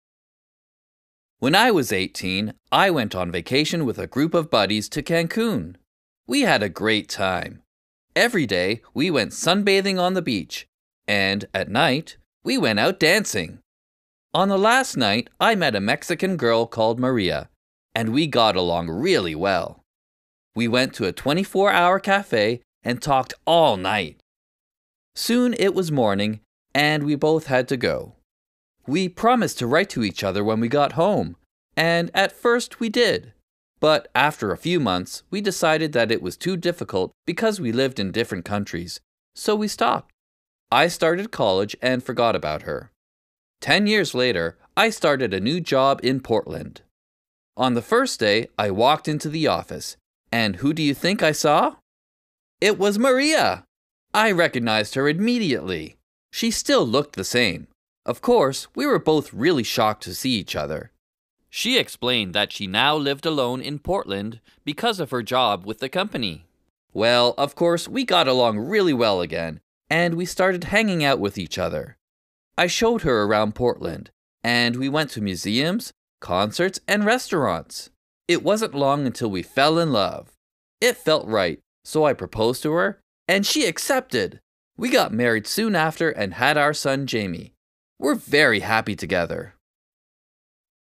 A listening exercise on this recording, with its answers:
1. Listen to the teacher talking to his class. Which of these is he talking about?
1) Chris met Maria in Cancun.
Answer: 2

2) Chris met Maria in Portland.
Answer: 4

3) Chris met on vacation with his friends.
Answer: 1

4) They got married and had a son.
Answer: 6

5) They decided to stop writing to each other.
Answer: 3

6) They fell in love.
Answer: 5

B. Listen again and answer the questions.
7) How old was Chris when he met Maria?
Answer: He was eighteen (years old).

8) What did they promise to do after the vacation?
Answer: They promised to write to each other.

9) Why did they decide to stop writing to each other?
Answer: They decided to stop because it was too difficult.

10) When did they meet again?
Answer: They met again ten years later.

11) How did they feel when they saw each other?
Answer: They felt (really) shocked.

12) What's their son's name?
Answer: Their son's name is Jamie.

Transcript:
When I was eighteen, I went on vacation with a group of buddies to Cancun. We had a great time. Every day, we went sunbathing on the beach, and, at night, we went out dancing. On the last night, I met a Mexican girl called Maria, and we got along really well. We went to a 24-hour café and talked all night. Soon it was morning, and we both had to go.
We promised to write to each other when we got home, and, at first, we did. But, after a few months, we decided that it was too difficult because we lived in different countries, so we stopped. I started college and forgot about her.
Ten years later, I started a new job in Portland. On the first day, I walked into the office, and who do you think I saw? It was Maria! I recognized her immediately. She still looked the same. Of course, we were both really shocked to see each other. She explained that she now lived alone in Portland because of her job with the company. Well, of course, we got along really well again, and we started hanging out with each other. I showed her around Portland, and we went to museums, concerts and restaurants.
It wasn't long until we fell in love! It felt right, so I proposed to her, and she accepted! We got married soon after and had our son, Jamie. We're very happy together!